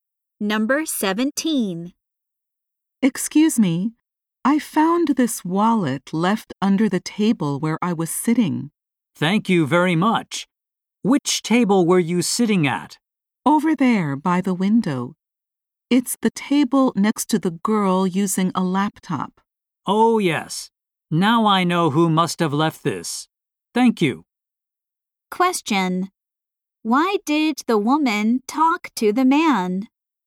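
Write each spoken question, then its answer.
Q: Why did the woman talk to the man?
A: To give him a wallet she found.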